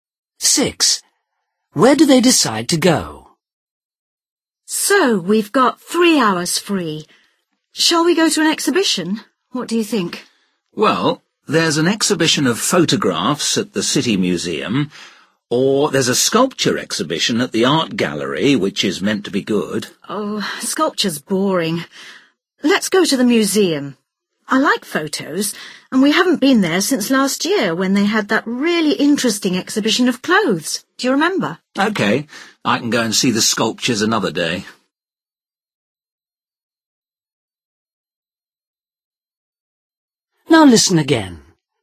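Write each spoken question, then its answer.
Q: Where do they decide to go?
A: The photograph exhibition at the City Museum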